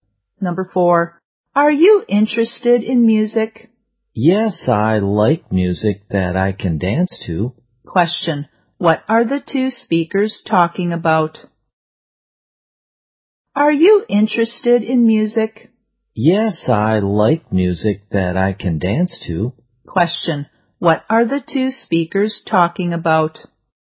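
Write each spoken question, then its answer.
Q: what are the two speakers talking about?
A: Music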